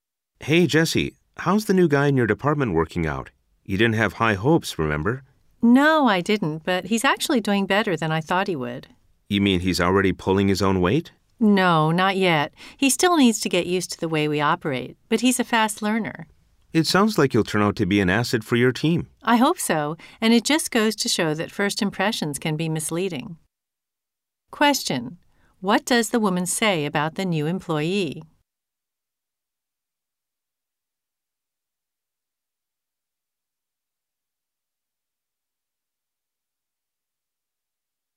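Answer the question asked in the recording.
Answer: He's doing better than she expected; he's a fast learner, though not yet pulling his own weight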